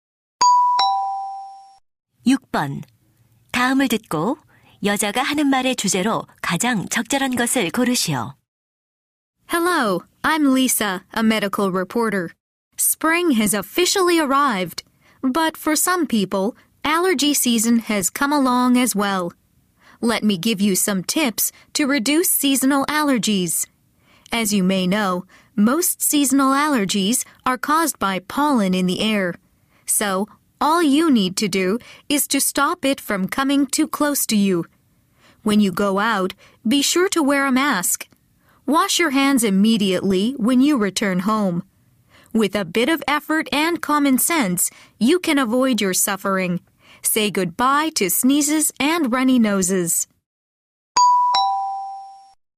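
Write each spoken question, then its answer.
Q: 다음을 듣고 여자가 하는 말의 주제로 가장 적절한 것을 고르시오.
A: 계절성 알레르기를 줄이는 방법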